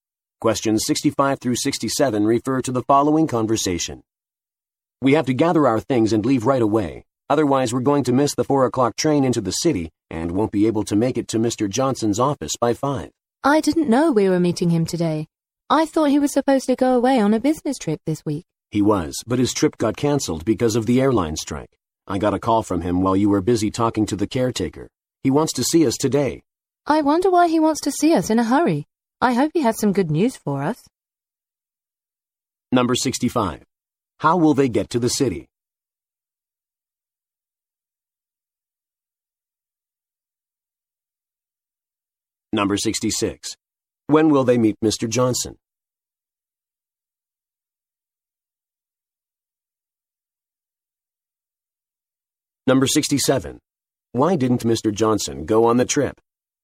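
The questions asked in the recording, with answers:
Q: How will they get to the city?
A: By train

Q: When will they meet Mr. Johnson?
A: Today at 5

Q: Why didn't Mr. Johnson go on the trip?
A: Because of an airline strike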